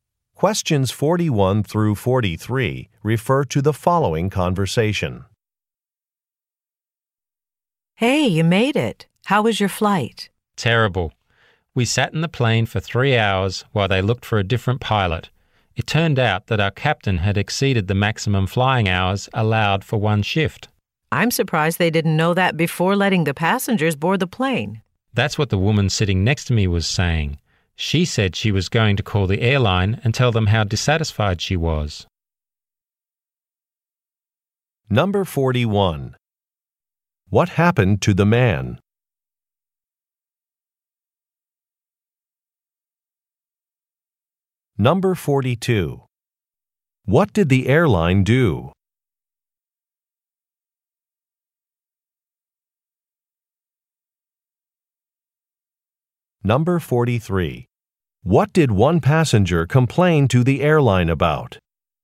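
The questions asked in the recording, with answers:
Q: What happened to the man?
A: His flight was delayed for 3 hours

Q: What did the airline do?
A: Found a different pilot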